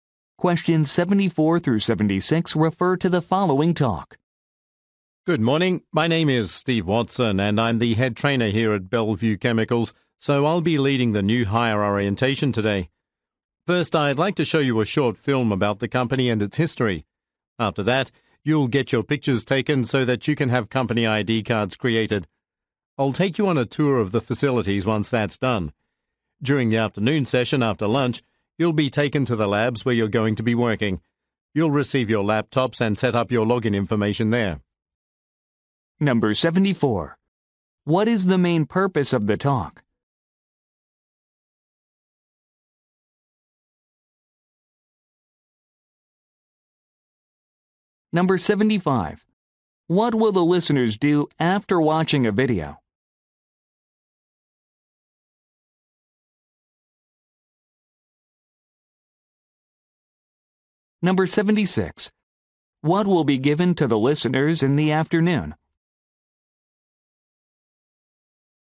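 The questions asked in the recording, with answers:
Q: What is the main purpose of the talk?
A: To lead a new hire orientation

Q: What will the listeners do after watching a video?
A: Have their pictures taken for ID cards

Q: What will be given to the listeners in the afternoon?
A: Laptops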